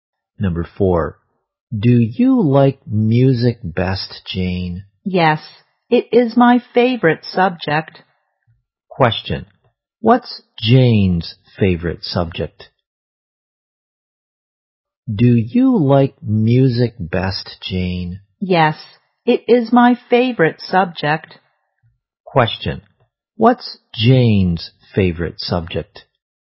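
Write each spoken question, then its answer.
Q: what's Jane's favorite subject?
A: Music.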